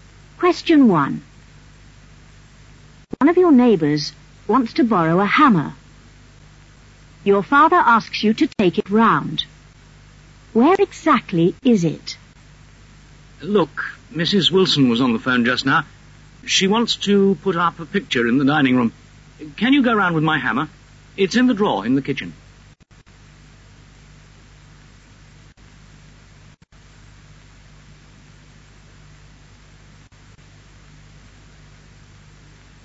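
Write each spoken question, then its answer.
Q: Where exactly is it?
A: In the drawer in the kitchen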